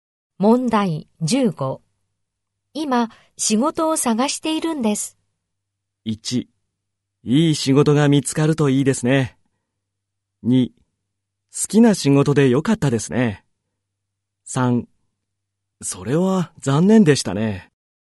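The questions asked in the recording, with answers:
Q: 今、仕事を探しているんです。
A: 1: いい仕事が見つかるといいですね。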